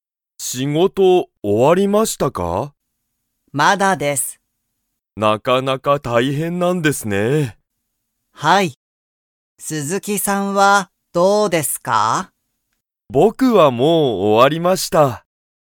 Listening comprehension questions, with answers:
佐藤(さとう)さんは、仕事(しごと)が終(お)わりましたか?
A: いいえ

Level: Level 1